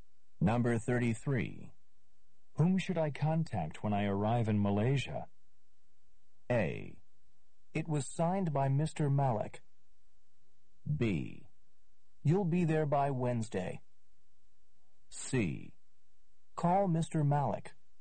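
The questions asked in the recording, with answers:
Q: Whom should I contact when I arrive in Malaysia?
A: C: Call Mr. Malik.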